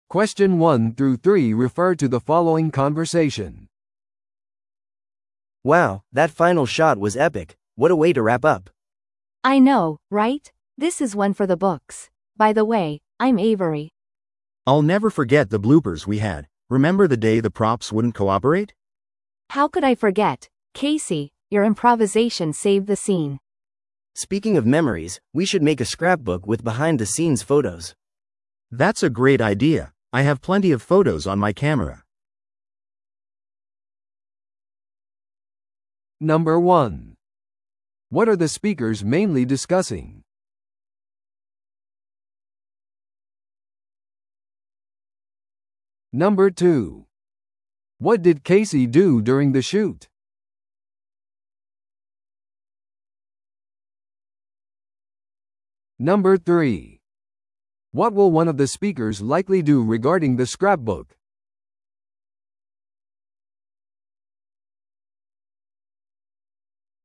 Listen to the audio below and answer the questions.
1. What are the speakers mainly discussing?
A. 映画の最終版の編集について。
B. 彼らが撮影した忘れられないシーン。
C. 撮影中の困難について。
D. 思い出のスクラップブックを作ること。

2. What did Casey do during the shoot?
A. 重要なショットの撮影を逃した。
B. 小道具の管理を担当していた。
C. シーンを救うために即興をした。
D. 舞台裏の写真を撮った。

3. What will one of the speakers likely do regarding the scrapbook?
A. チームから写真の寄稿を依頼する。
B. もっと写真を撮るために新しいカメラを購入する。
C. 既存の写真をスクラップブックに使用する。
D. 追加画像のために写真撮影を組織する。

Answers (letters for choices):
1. D
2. C
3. C

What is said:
A: Wow, that final shot was epic! What a way to wrap up.
B: I know, right? This is one for the books. By the way, I'm Avery.
C: I'll never forget the bloopers we had. Remember the day the props wouldn't cooperate?
B: How could I forget? Casey, your improvisation saved the scene!
A: Speaking of memories, we should make a scrapbook with behind-the-scenes photos.
C: That's a great idea! I have plenty of photos on my camera.